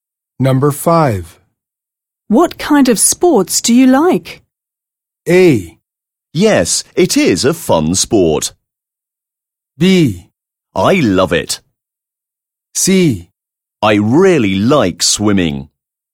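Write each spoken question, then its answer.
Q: What kind of sports do you like?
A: C: I really like swimming.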